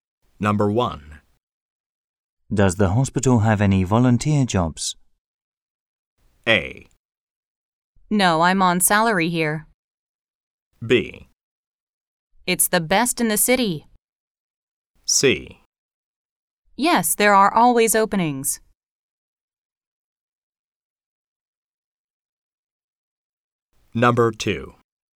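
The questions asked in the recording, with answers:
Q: Does the hospital have any volunteer jobs?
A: C: Yes, there are always openings.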